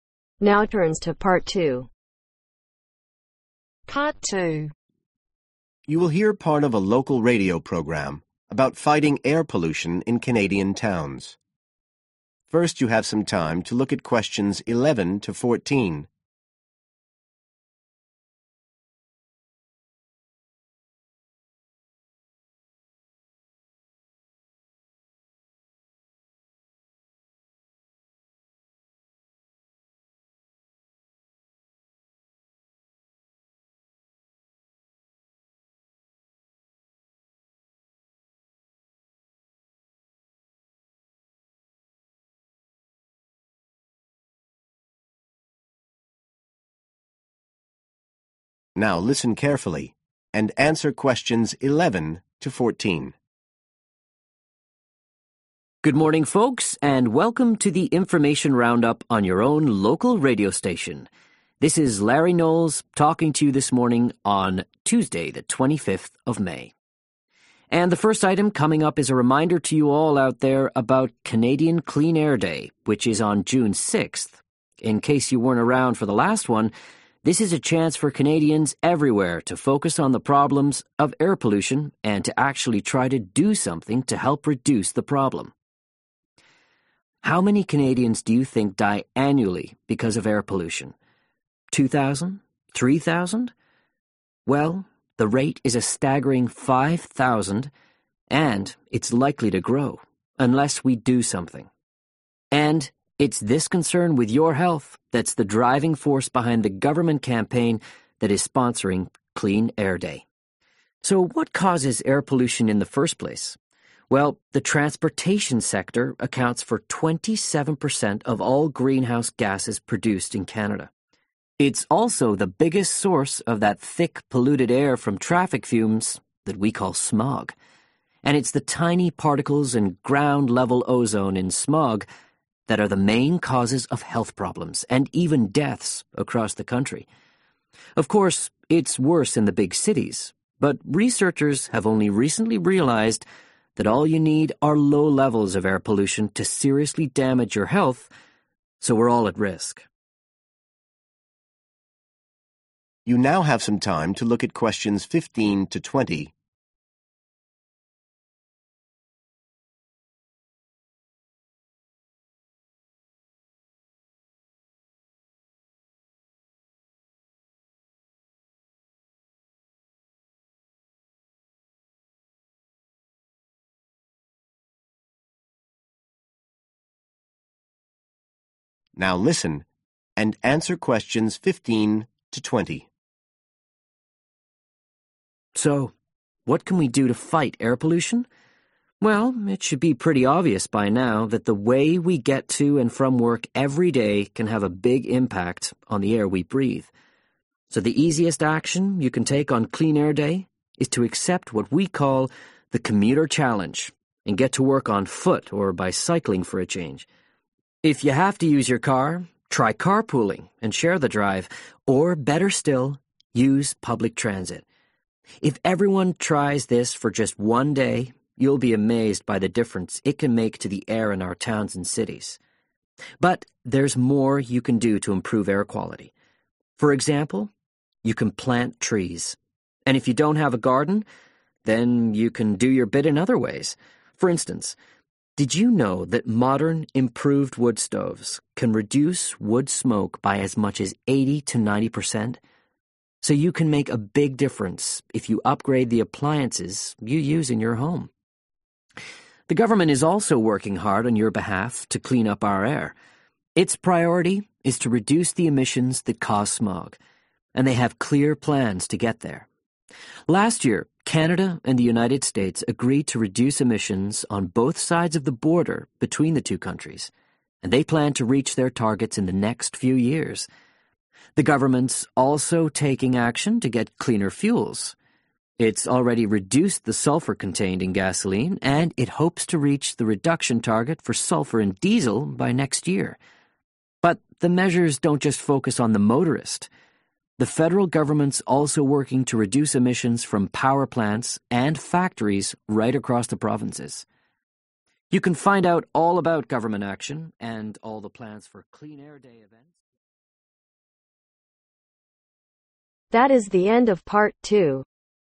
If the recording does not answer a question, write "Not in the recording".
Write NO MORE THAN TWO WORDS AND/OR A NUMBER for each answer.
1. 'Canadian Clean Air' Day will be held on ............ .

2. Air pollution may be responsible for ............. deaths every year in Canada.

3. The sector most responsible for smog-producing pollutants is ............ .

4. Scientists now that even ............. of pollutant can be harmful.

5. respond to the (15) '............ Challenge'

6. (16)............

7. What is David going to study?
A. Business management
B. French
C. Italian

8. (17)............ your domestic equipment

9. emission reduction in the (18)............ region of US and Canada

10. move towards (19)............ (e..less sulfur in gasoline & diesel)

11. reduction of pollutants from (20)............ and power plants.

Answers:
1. June 6th
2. 5,000
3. Transportation
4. Low levels
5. Commuter
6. Plant trees
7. Not in the recording
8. Upgrade
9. Border
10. Clean(er) fuels
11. Factories